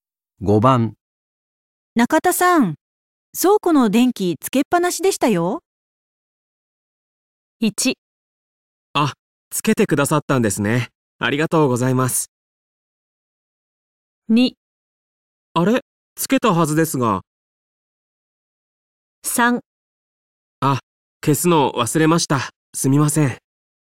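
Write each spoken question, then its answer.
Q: 中田さん、倉庫の電気つけっぱなしでしたよ。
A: 3: 消すの忘れました。すみません。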